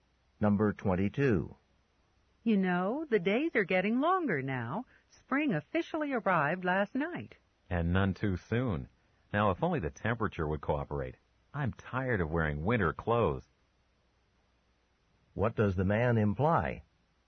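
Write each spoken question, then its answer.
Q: What does the man imply?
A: He wishes it were warmer.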